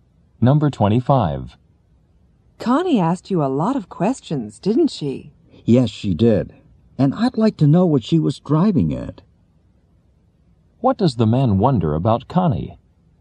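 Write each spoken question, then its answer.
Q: What does the man wonder about Connie?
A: What she was trying to find out with her questions.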